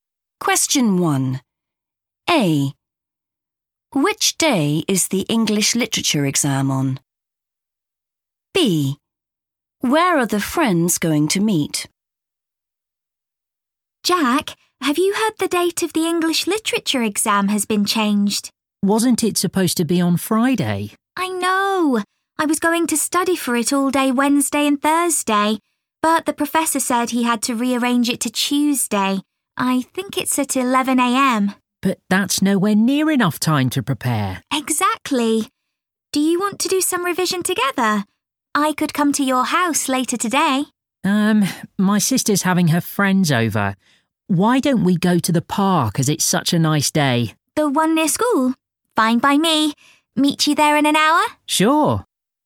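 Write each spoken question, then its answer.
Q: Which day is the English literature exam on?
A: Tuesday

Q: Where are the friends going to meet?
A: in the park near school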